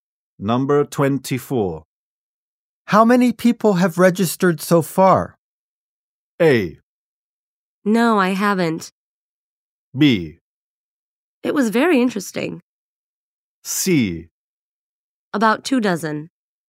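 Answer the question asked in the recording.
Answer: C: About 24.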